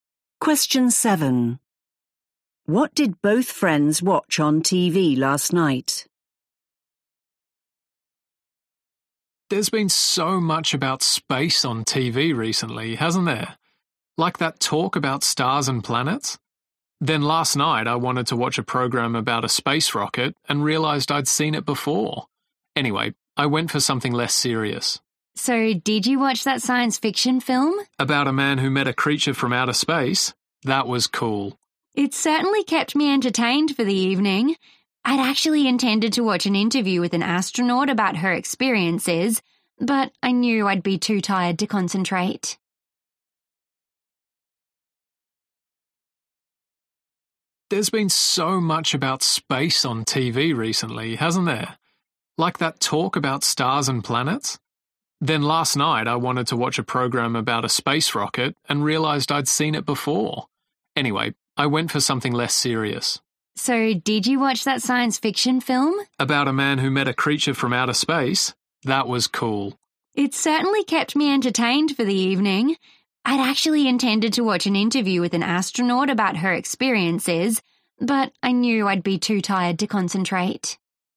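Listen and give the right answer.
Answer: a science fiction film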